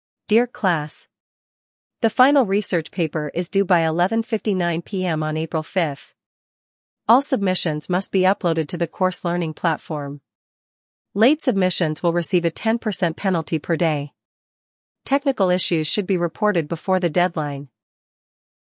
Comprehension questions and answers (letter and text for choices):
Listen to an announcement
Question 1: What is the main purpose of the announcement?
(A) To explain grading standards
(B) To announce the research topic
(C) To provide submission rules for the paper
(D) To introduce the learning platform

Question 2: What happens if a paper is submitted late?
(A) It will not be accepted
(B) It will receive a daily penalty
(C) It must be emailed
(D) It will be graded later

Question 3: What should students do if they have technical problems?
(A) Submit late without penalty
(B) Ignore the deadline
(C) Report the issue before the deadline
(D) Contact classmates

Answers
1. (C) To provide submission rules for the paper
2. (B) It will receive a daily penalty
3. (C) Report the issue before the deadline

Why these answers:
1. The announcement focuses on how and when to submit the paper.
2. The announcement states there is a 10% penalty per day.
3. Students are instructed to report technical issues in advance.